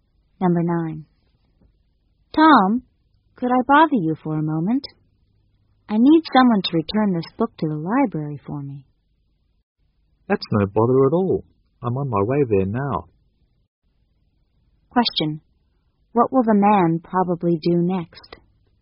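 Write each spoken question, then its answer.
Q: what will the man probably do next?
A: Take the book to the library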